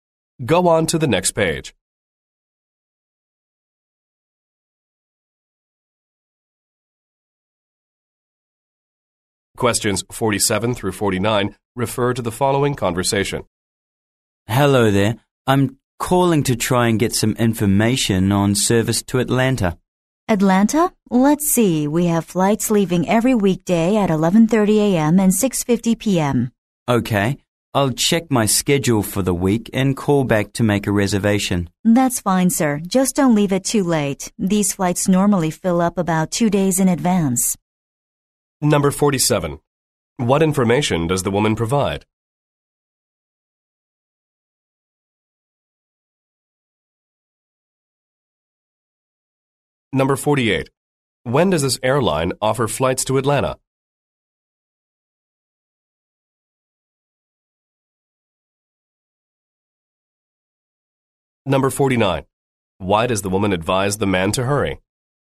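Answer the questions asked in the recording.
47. Flight times to Atlanta
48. Every weekday at 11:30 a.m. and 6:50 p.m.
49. The flights usually fill up about two days in advance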